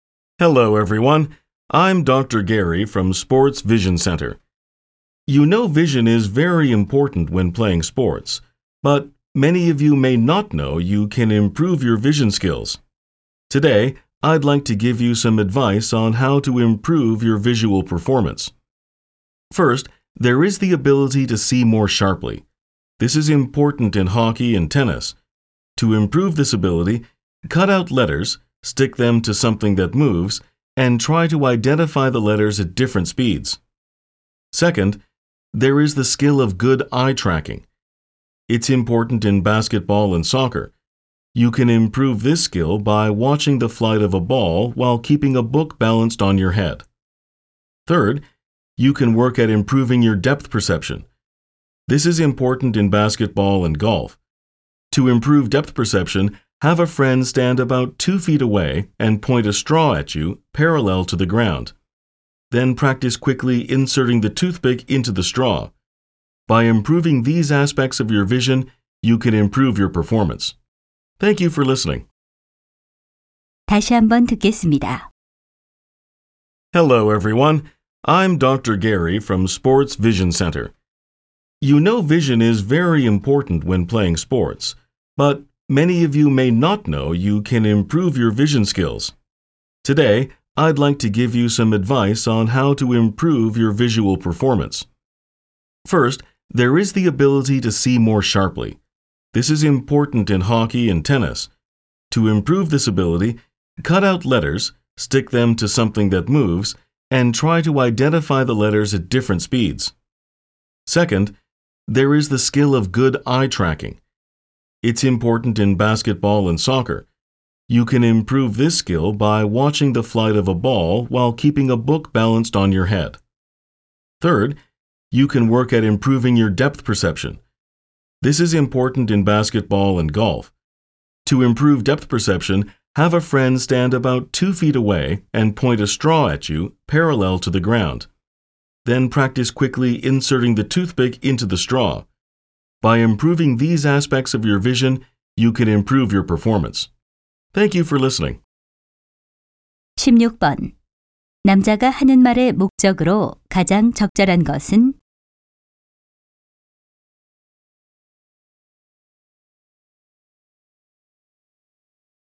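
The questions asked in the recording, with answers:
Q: 남자가 하는 말의 목적으로 가장 적절한 것은?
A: 스포츠 수행을 위한 시각 능력 향상 방법을 조언하려고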